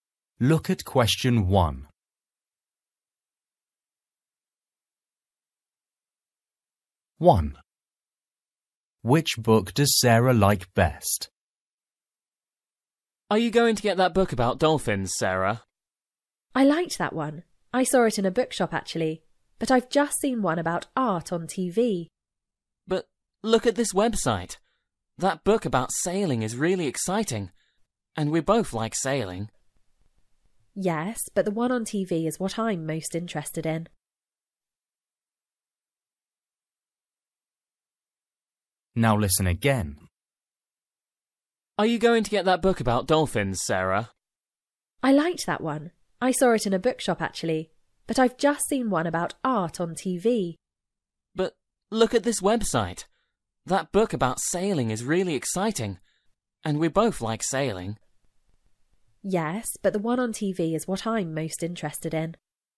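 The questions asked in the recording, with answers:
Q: Which book does Sarah like best?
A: the book about art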